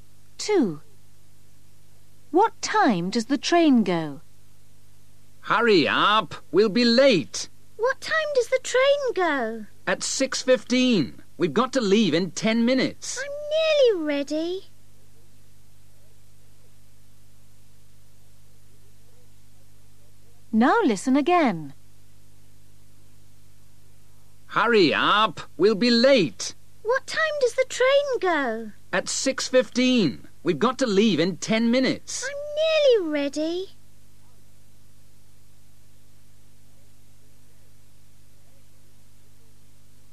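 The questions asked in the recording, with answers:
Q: What time does the train go?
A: 6:15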